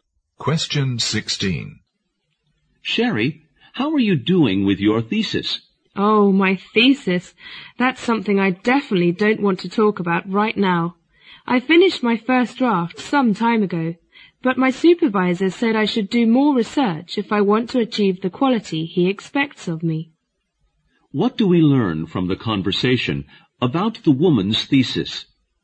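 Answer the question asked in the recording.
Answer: She needs to do more research to improve it to her supervisor's standard.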